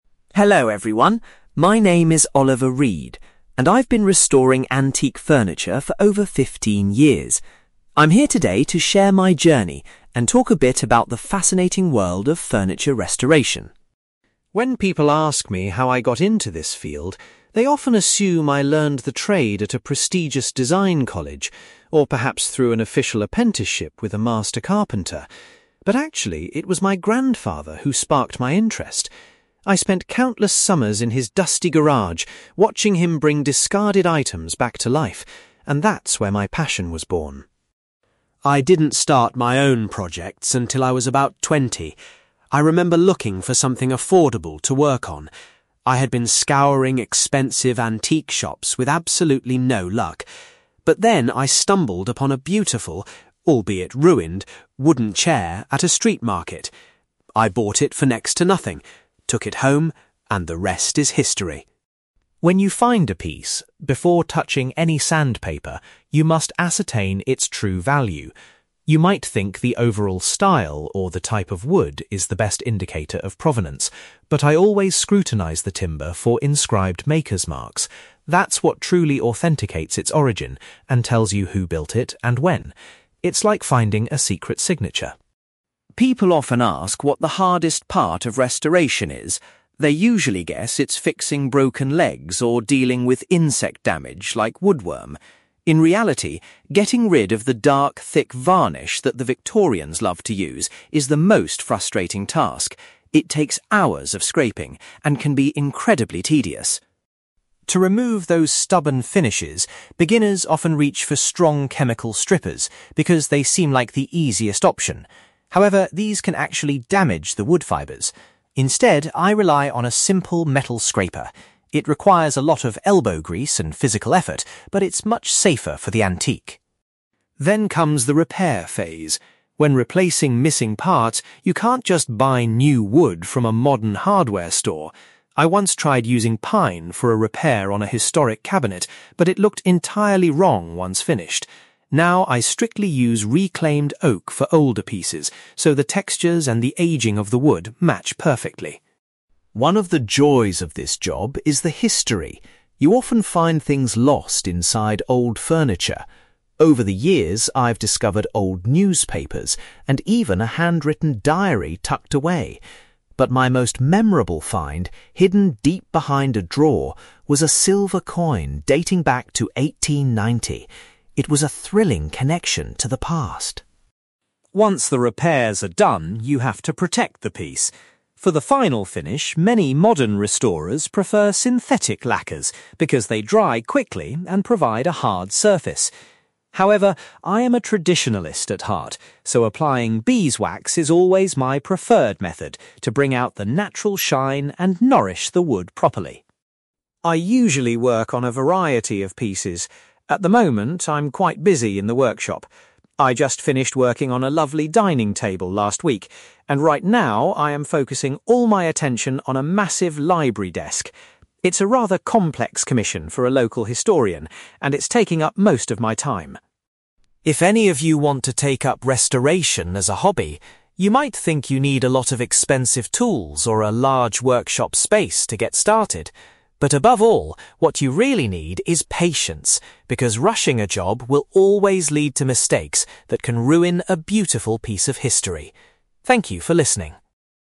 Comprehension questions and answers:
You will hear an antique furniture restorer called Oliver Reed giving a talk about his work and his passion for restoring old pieces. For questions 9-18, complete the sentences with a word or short phrase.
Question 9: Oliver says his (9)........................... was the person who originally inspired him to restore furniture.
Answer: grandfather

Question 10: Oliver found the very first piece of furniture he restored at a (10)........................... .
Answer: street market

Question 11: To authenticate an antique, Oliver carefully checks the wood for (11)........................... .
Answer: maker's marks

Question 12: Oliver explains that removing old (12)........................... is the most challenging step in the restoration process.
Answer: varnish

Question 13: Rather than using harsh chemicals, Oliver prefers to use a (13)........................... to clean old surfaces.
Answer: metal scraper

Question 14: Oliver ensures his repairs look authentic by using (14)........................... to replace missing parts.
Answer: reclaimed oak

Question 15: Oliver was most surprised to discover a (15)........................... tucked behind a drawer in an old piece.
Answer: silver coin

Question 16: Oliver chooses to use (16)........................... to give his restored pieces a traditional shine.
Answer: beeswax

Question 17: Oliver is currently restoring a large (17)........................... for a client.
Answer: library desk

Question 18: According to Oliver, (18)........................... is the most important requirement for anyone wanting to start this hobby.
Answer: patience

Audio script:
Oliver Reed: Hello everyone. My name is Oliver Reed, and I've been restoring antique furniture for over fifteen years. I'm here today to share my journey and talk a bit about the fascinating world of furniture restoration.
When people ask me how I got into this field, they often assume I learned the trade at a prestigious design college, or perhaps through an official apprenticeship with a master carpenter. But actually, it was my grandfather who sparked my interest. I spent countless summers in his dusty garage watching him bring discarded items back to life, and that's where my passion was born.
I didn't start my own projects until I was about twenty. I remember looking for something affordable to work on. I had been scouring expensive antique shops with absolutely no luck, but then I stumbled upon a beautiful, albeit ruined, wooden chair at a street market. I bought it for next to nothing, took it home, and the rest is history.
When you find a piece, before touching any sandpaper, you must ascertain its true value. You might think the overall style or the type of wood is the best indicator of provenance, but I always scrutinize the timber for inscribed maker's marks. That's what truly authenticates its origin and tells you who built it and when. It's like finding a secret signature.
People often ask what the hardest part of restoration is. They usually guess it's fixing broken legs or dealing with insect damage like woodworm. In reality, getting rid of the dark, thick varnish that the Victorians loved to use is the most frustrating task. It takes hours of scraping and can be incredibly tedious.
To remove those stubborn finishes, beginners often reach for strong chemical strippers, because they seem like the easiest option. However, these can actually damage the wood fibers. Instead, I rely on a simple metal scraper. It requires a lot of elbow grease and physical effort, but it's much safer for the antique.
Then comes the repair phase. When replacing missing parts, you can't just buy new wood from a modern hardware store. I once tried using pine for a repair on a historic cabinet, but it looked entirely wrong once finished. Now, I strictly use reclaimed oak for older pieces so the textures and the aging of the wood match perfectly.
One of the joys of this job is the history. You often find things lost inside old furniture. Over the years, I've discovered old newspapers and even a handwritten diary tucked away. But my most memorable find, hidden deep behind a drawer, was a silver coin dating back to 1890. It was a thrilling connection to the past.
Once the repairs are done, you have to protect the piece. For the final finish, many modern restorers prefer synthetic lacquers because they dry quickly and provide a hard surface. However, I am a traditionalist at heart, so applying beeswax is always my preferred method to bring out the natural shine and nourish the wood properly.
I usually work on a variety of pieces. At the moment, I'm quite busy in the workshop. I just finished working on a lovely dining table last week, and right now I am focusing all my attention on a massive library desk. It's a rather complex commission for a local historian, and it's taking up most of my time.
If any of you want to take up restoration as a hobby, you might think you need a lot of expensive tools or a large workshop space to get started. But above all, what you really need is patience, because rushing a job will always lead to mistakes that can ruin a beautiful piece of history. Thank you for listening.

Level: B2